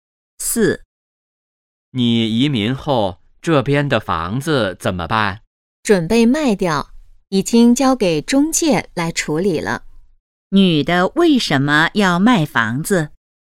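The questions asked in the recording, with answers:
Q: 女的为什么要卖房子?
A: 她要移民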